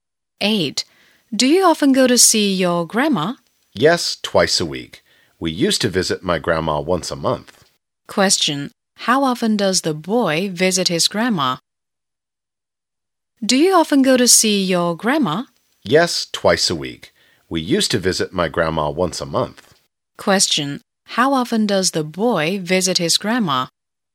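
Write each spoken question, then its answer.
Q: How often does the boy visit his grandma?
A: Twice a week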